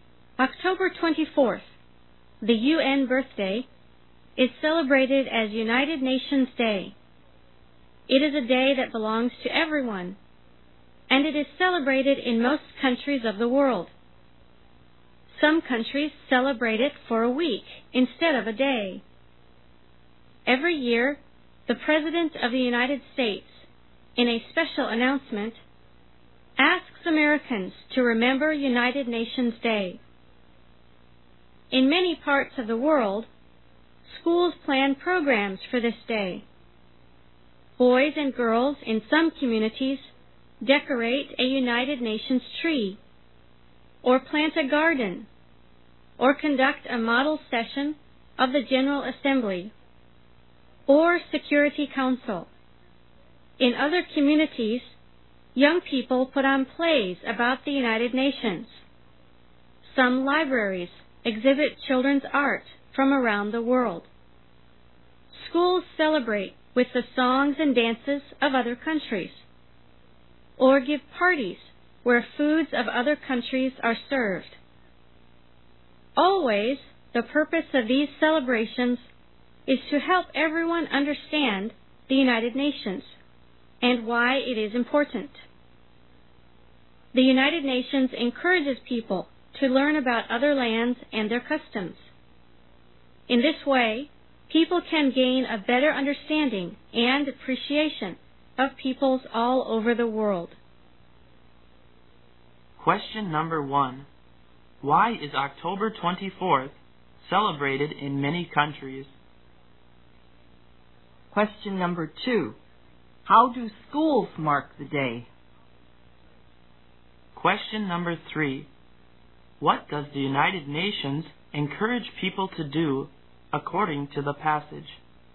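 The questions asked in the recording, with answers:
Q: Why is October 24th celebrated in many countries?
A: It is the UN's birthday, United Nations Day

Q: How do schools mark the day?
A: They plan programs, such as decorating a UN tree, holding model sessions, putting on plays, and having songs, dances and foods of other countries

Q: What does the United Nations encourage people to do according to the passage?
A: Learn about other lands and their customs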